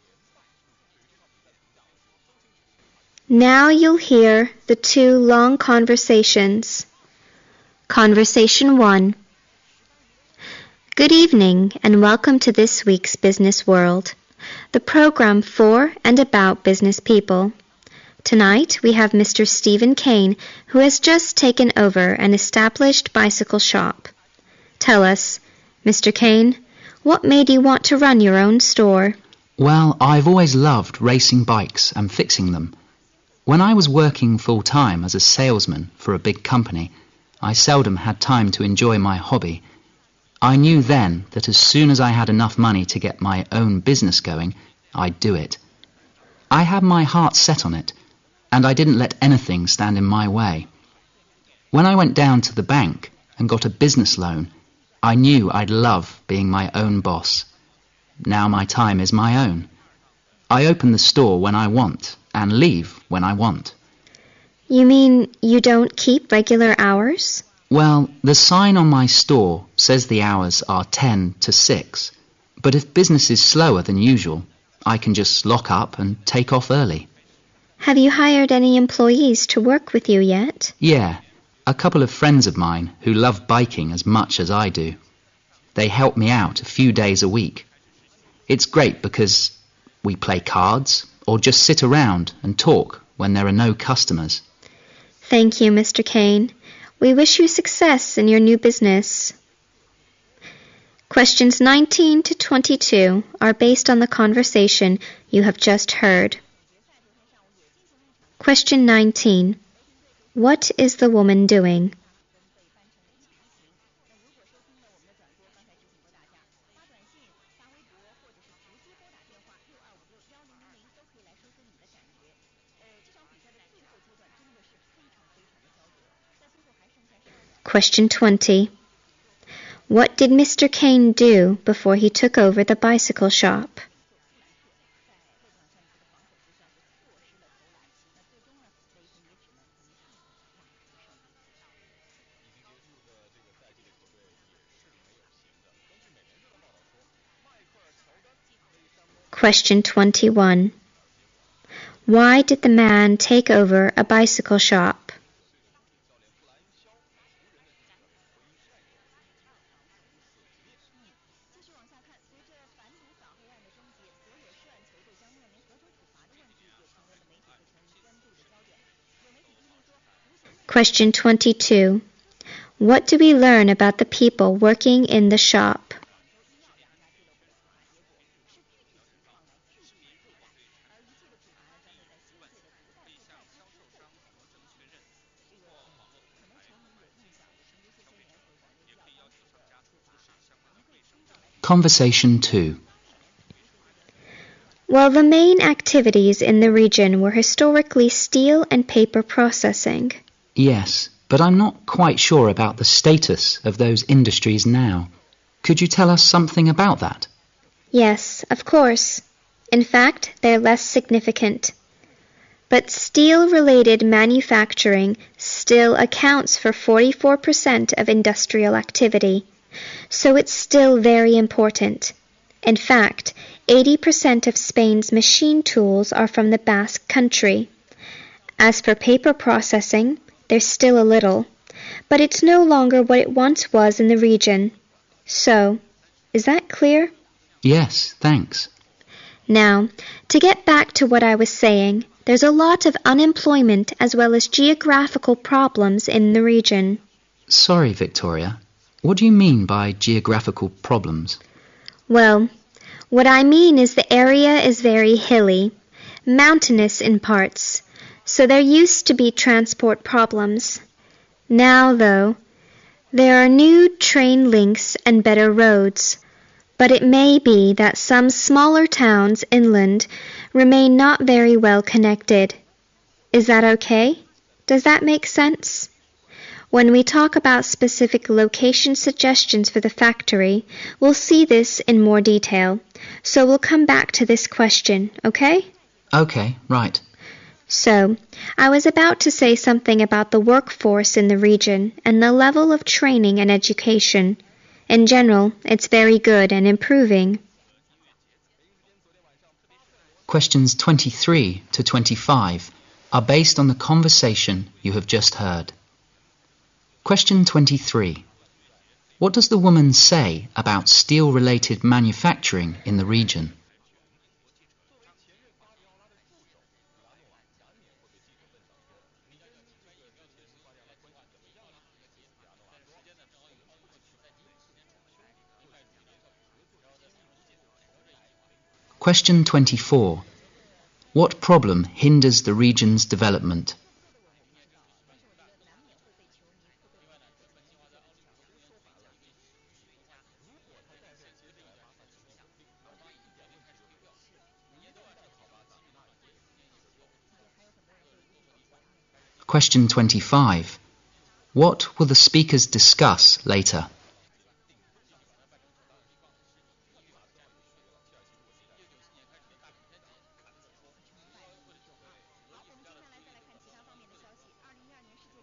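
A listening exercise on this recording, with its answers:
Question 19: What is the woman doing?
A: Hosting a business program and interviewing Mr. Kayne.

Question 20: What did Mr. Kayne do before he took over the bicycle shop?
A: He was a salesman for a big company.

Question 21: Why did the man take over a bicycle shop?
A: He loved bikes and wanted to be his own boss.

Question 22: What do we learn about the people working in the shop?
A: They are his friends who love biking.

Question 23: What does the woman say about the steel-related manufacturing in the region?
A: It is still very important (44% of industrial activity).

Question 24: What problems hinder the region's development?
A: Unemployment and geographical problems.

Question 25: What will the speakers discuss later?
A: Specific locations for the factory.

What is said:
Conversation 1
W:Good evening, and welcome to this week's business world, the program for and about business people. 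Tonight we have Mr. Steven Kayne, who has just taken over and established bicycle shop. Tell us, Mr. Kayne, what made you want to run your own store?
M: Well, I always loved racing bikes and fixing them. When I was working full-time as a salesman for a big company, I seldom had time to enjoy my hobby. I knew then that as soon as I had enough money to get my own business going, I'll do it. I had my heart set on it and I didn't let anything stand in my way. When I went down to the bank and got a business loan, I knew I'd love being my own boss. Now my time is my own. I open the store when I want and leave when I want.
W: You mean you don't keep regular hours?
M: Well, the sign on my store says the hours are ten to six, but if business is slower than usual, I can just lock up and take off early.
W: Have you hired any employees to work with you yet?
M: Yeah, a couple of friends of mine who love biking as much as I do. 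They help me out a few days a week. It's great because we play cards or just sit around and talk when there are no customers.
W: Thank you, Mr. Kayne. We wish you success in your new business.
Question 19-22 are based on the conversation you have just heard.
Conversation 2
W: Well, the main activities in the region were historically steel and paper processing, I think.
M: Yes, but I'm not quite sure about the status of those industries now. Could you tell us something about that?
W: Yes, of course. In fact, they are less significant, but steel-related manufacturing still accounts for 44% of industrial activity. So it's still very important. In fact, 80% of Spain's machine tools are from the Basque Country. As for paper processing, there's still a little. But it's no longer what it once was in the region. So, is that clear?
M: Yes, thanks.
W: Now, to get back to what I was saying, there's a lot of unemployment as well as geographical problems in the region.
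M: Sorry, Victoria. What do you mean by geographical problems?
W: Well, what I mean is the area is very hilly, mountainous in parts. So there used to be transport problems, now though there are new train links and better roads, but it may be that some smaller towns inland remain not very well connected, is that OK? Does that make sense? When we talk about specific location suggestions for the factory, we'll see this in more detail, so we'll come back to this question, OK?
W: So I was about to say something about the work force in the region and the level of training and education. In general, it's very good and improving.

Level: 四级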